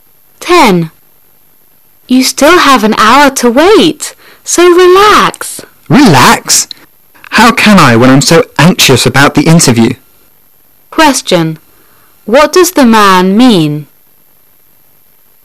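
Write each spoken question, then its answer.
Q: What does the man mean?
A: He can't relax because he is anxious about the interview.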